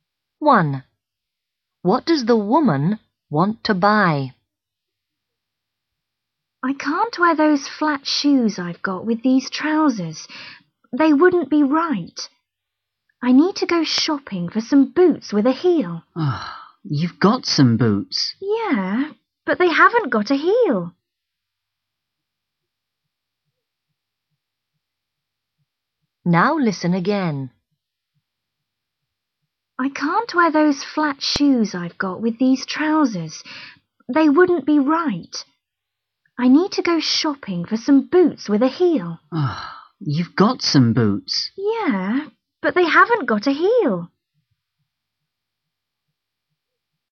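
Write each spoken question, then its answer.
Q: What does the woman want to buy?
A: boots with a heel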